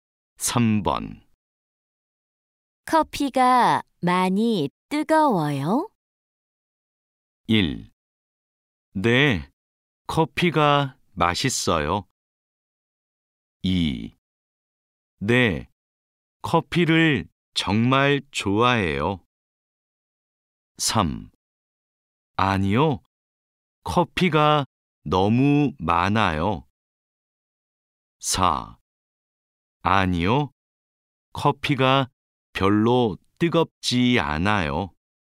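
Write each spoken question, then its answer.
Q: 커피가 많이 뜨거워요?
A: 4: 아니요, 커피가 별로 뜨겁지 않아요.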